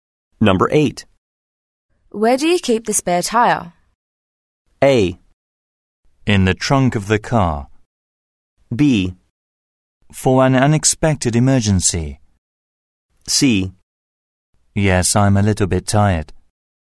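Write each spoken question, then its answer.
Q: Where do you keep the spare tire?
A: A: In the trunk of the car.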